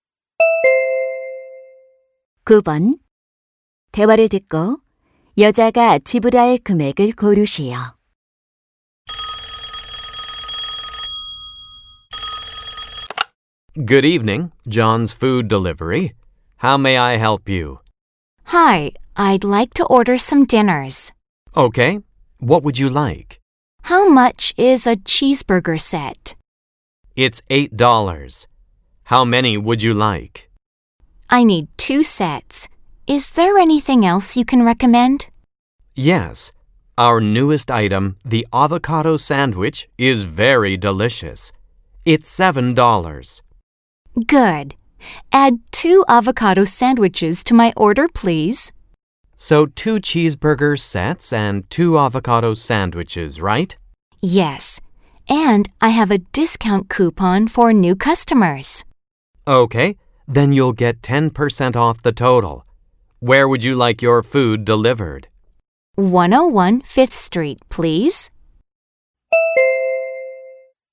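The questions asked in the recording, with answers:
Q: 대화를 듣고 여자가 지불할 금액을 고르시오.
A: $27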